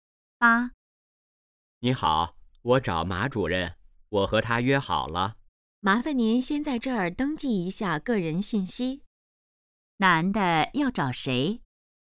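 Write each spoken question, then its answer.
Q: 男的要找谁?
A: 马主任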